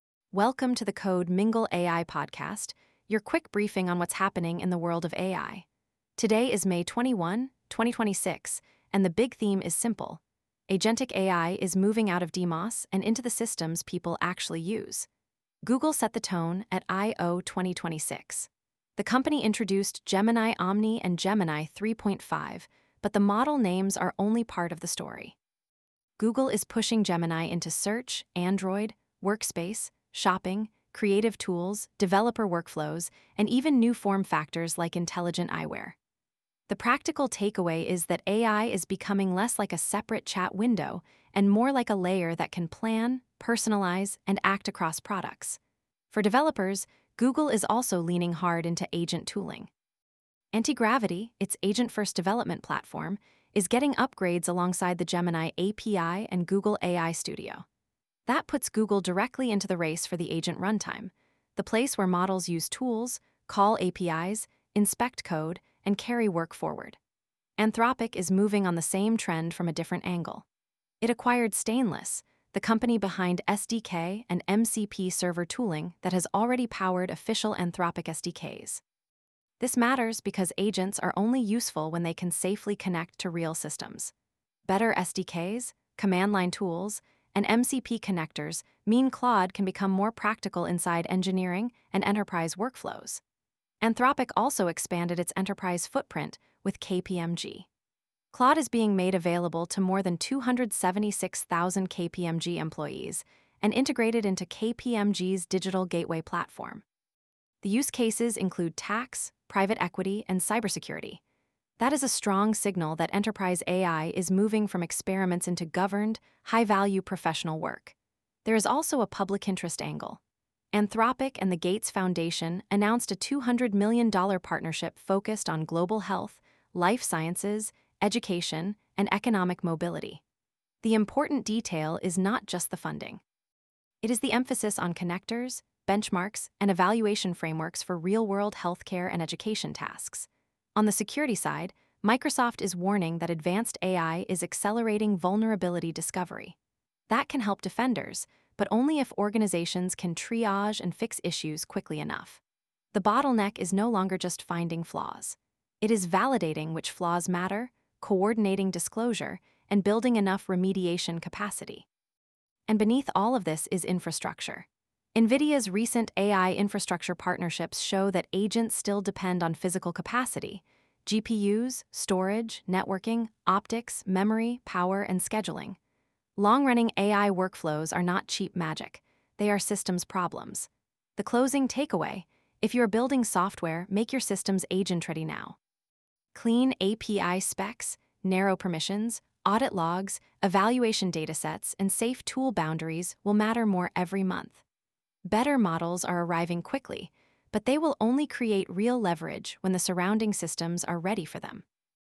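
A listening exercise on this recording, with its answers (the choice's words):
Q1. What was the main strategic signal from Google I/O 2026 for AI builders?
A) Google is moving Gemini primarily into offline desktop software.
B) Google is positioning Gemini as an agent layer across products, developer tools, and workflows.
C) Google is leaving agent development to third-party vendors.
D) Google is focusing only on image generation.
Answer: Google is positioning Gemini as an agent layer across products, developer tools, and workflows.

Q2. Why does Anthropic's acquisition of Stainless matter for agentic AI?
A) It gives Anthropic more consumer hardware designers.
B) It removes the need for Claude to use external tools.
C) It strengthens SDK, CLI, and MCP server tooling that helps agents connect to real APIs.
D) It turns Claude into a video generation model.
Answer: It strengthens SDK, CLI, and MCP server tooling that helps agents connect to real APIs.

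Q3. What does the KPMG-Claude alliance suggest about enterprise AI adoption?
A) Enterprise AI is limited to casual chatbots.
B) Claude is being embedded into governed, document-heavy professional workflows.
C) Consulting firms are avoiding AI in regulated work.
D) Cybersecurity is no longer a relevant use case for AI.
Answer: Claude is being embedded into governed, document-heavy professional workflows.

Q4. According to the newsletter, what is a major bottleneck created by AI-accelerated vulnerability discovery?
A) Having enough remediation capacity to validate, prioritize, and fix real risks.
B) Generating more benchmark charts.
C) Removing all human review from security programs.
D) Publishing every finding immediately without triage.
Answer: Having enough remediation capacity to validate, prioritize, and fix real risks.

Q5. Why is AI infrastructure still central even when the news focuses on models and agents?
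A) Agentic workflows require inference, context, storage, networking, and power at large scale.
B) Infrastructure announcements are unrelated to AI products.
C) Agents reduce compute needs to zero.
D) Only mobile devices run modern frontier models.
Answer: Agentic workflows require inference, context, storage, networking, and power at large scale.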